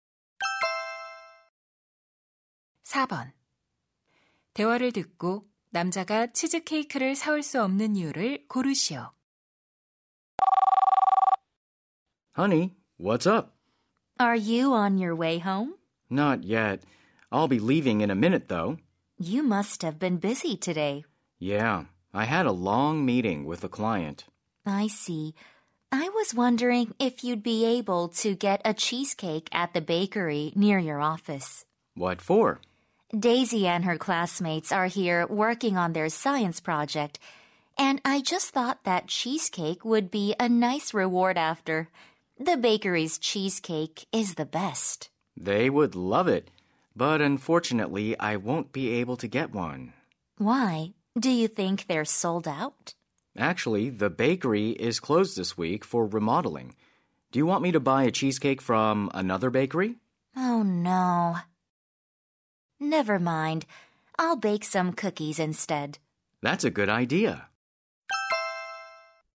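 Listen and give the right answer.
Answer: 빵집이 이번 주 리모델링으로 문을 닫아서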